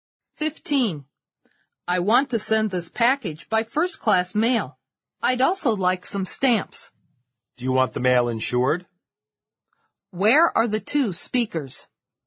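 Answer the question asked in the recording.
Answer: At a post office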